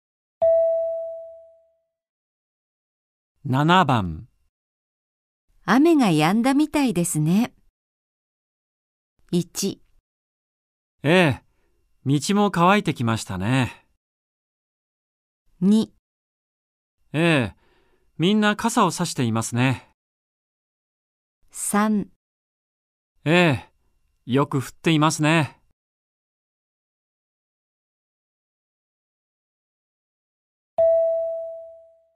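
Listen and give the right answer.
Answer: 1: ええ、道も乾いてきましたね。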